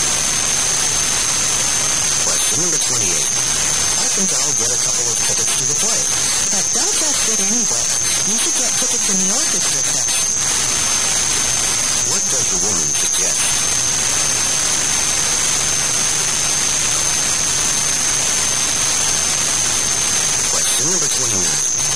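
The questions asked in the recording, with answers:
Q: What does the woman suggest?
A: Get tickets in the orchestra section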